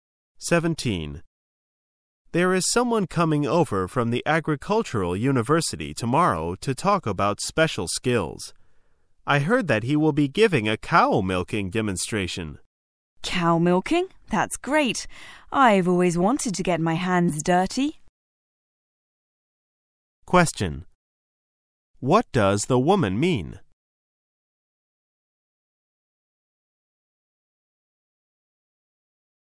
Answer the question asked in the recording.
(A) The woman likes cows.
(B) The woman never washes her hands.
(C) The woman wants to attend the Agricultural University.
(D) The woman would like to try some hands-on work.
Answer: (D) The woman would like to try some hands-on work.

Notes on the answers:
此题考查听细节的能力。解题关键在于理解这里的get one's hands dirty与try some hands-on work,同义,意指"尝试亲自动手做某事"。

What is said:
[解析] M: There is someone coming over from the Agricultural University tomorrow to talk about special skills. I heard that he will be giving a cow milking demonstration. W: Cow milking? That's great! I've always wanted to get my hands dirty. Q: What does the woman mean?